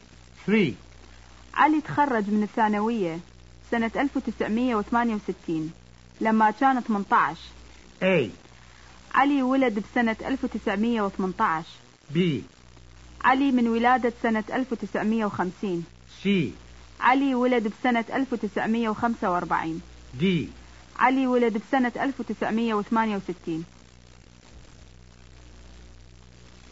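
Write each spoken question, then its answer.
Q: علي تخرج من الثانوية سنة 1968 لما كان 18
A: B: علي من ولادة سنة 1950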